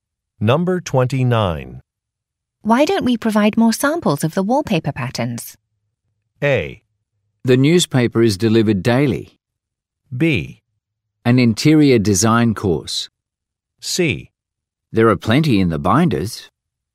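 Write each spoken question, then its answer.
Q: Why don't we provide more samples of the wallpaper patterns?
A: C: There are plenty in the binders.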